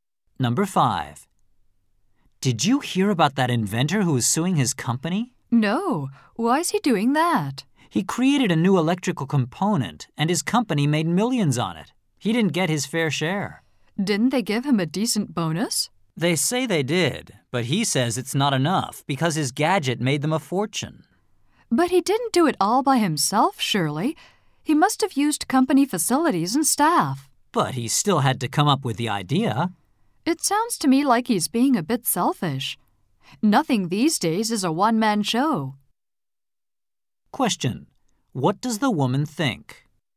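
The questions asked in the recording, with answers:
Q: What does the woman think?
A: The inventor is being selfish, since he relied on company facilities and staff.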